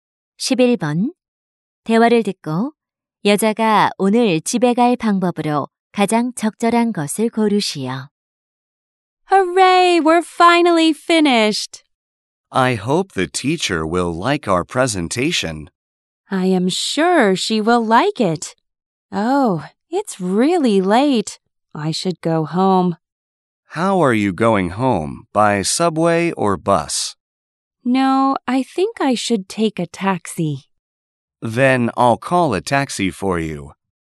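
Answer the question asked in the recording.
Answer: 택시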